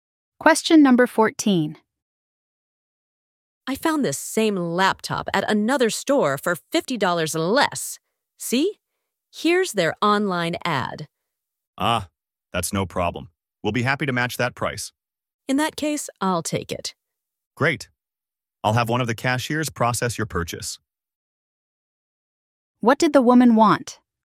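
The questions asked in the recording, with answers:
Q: What did the woman want?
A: A price match for the laptop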